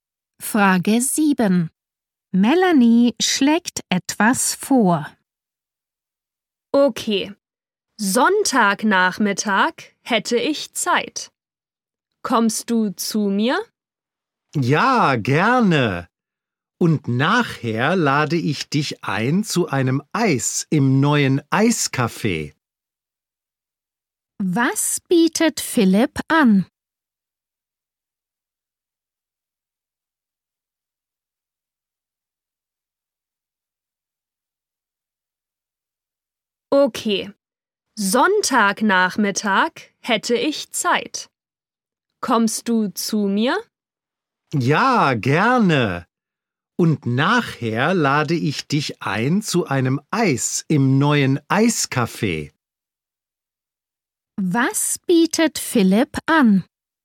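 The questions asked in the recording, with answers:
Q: Was bietet Philipp an?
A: Ein Eis im neuen Eiscafé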